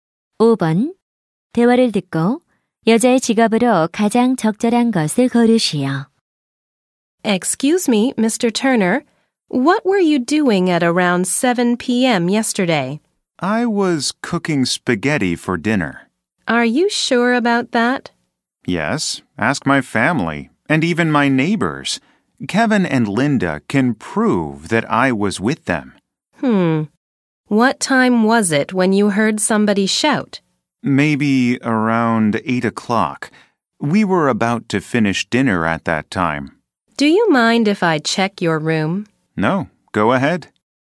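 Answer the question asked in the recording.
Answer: 경찰(형사)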